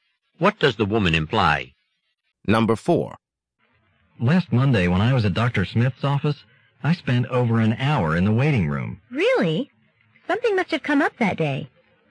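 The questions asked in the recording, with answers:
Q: What does the woman imply?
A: The long wait was unusual; something unexpected probably happened that day.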